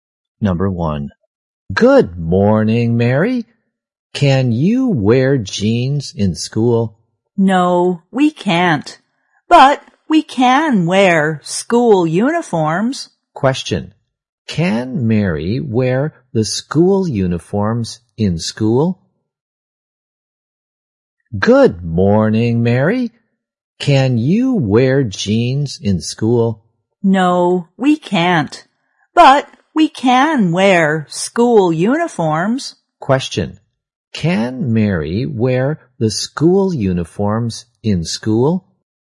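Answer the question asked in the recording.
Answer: Yes, she can.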